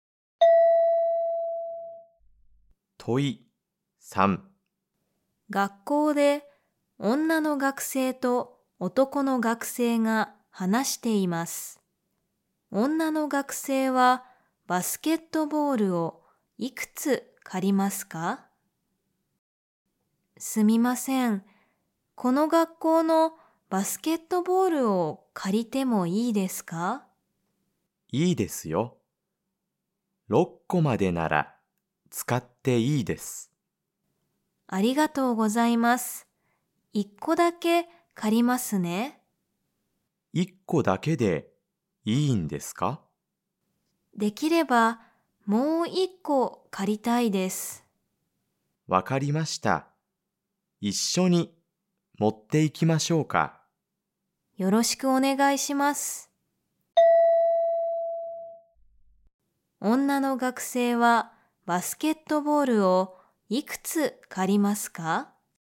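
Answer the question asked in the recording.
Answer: 2個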